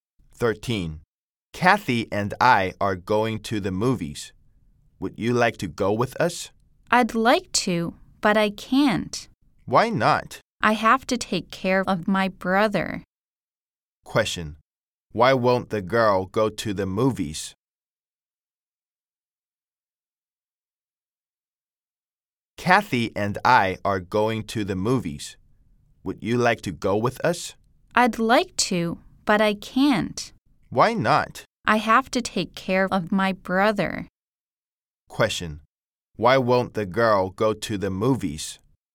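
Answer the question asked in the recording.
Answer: She has to take care of her brother.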